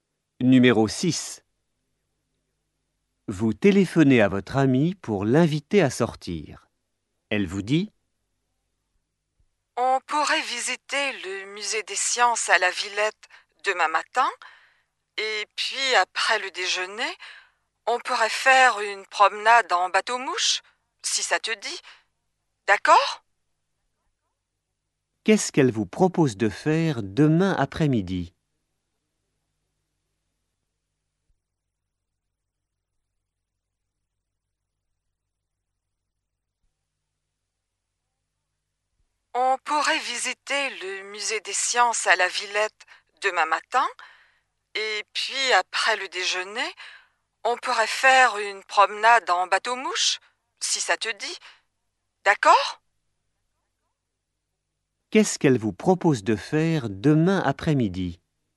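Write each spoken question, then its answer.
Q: Qu'est-ce qu'elle vous propose de faire demain après-midi ?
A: une promenade en bateau-mouche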